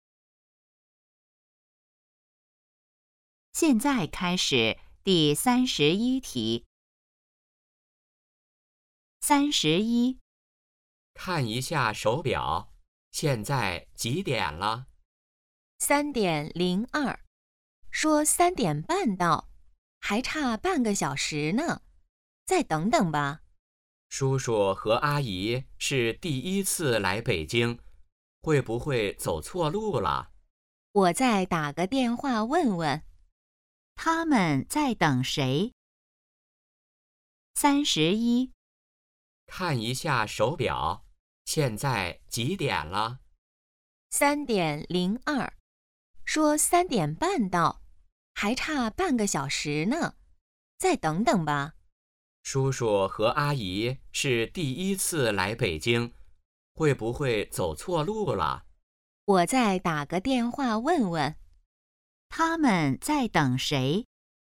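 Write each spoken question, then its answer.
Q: 他们在等谁?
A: 叔叔和阿姨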